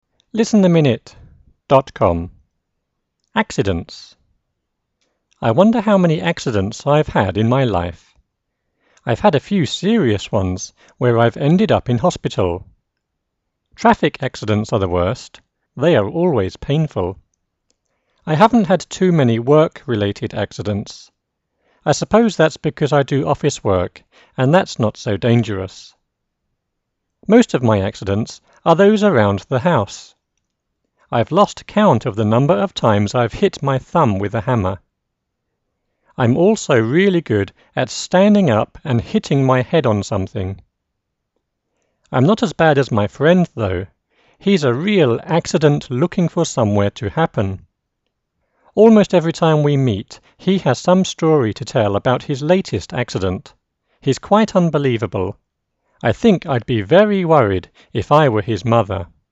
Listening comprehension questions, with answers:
.Fill in the gaps with the appropriate words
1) I N1. ____________ how many accidents I've had in my life.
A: Wonder

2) I've had a few serious ones where I've ended up in N2. ____________.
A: hospital

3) I N3. ____________ had too many work-related accidents.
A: haven't

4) I suppose that's because I do N4. ____________ work and that's not so dangerous.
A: office

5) I've lost count of the N5. ____________ of times I've hit my thumb with a hammer.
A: number

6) I'm also really good at standing up and N6. ____________ my head on something.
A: hitting

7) I'm not as bad as my friend N7. ____________.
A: though

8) Almost every time we meet, he has some story to tell about his N8. __________ accident.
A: latest

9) He's N9. ____________ unbelievable.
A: quite

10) I think I'd be very N10. ____________ if I were his mother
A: worried